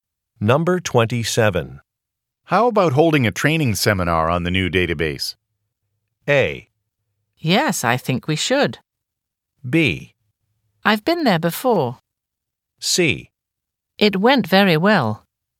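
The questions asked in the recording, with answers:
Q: How about holding a training seminar on the new database?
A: A: Yes, I think we should.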